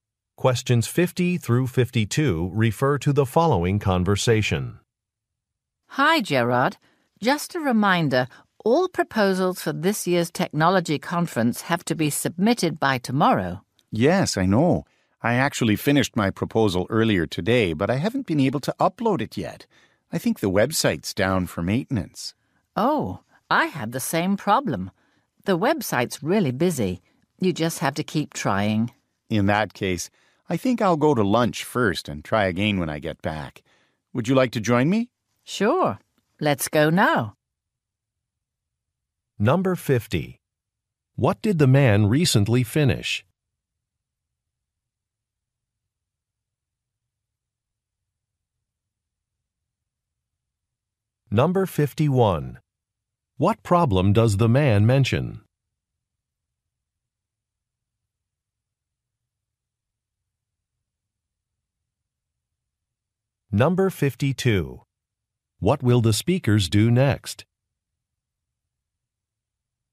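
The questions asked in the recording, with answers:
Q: What did the man recently finish?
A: A conference proposal

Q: What problem does the man mention?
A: He can't upload it because the website seems to be down

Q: What will the speakers do next?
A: Go to lunch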